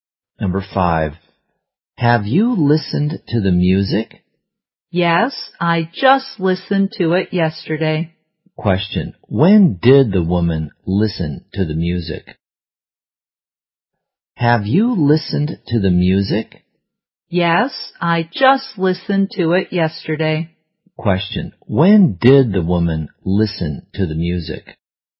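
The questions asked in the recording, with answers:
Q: Question, when did the woman listen to the music?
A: Yesterday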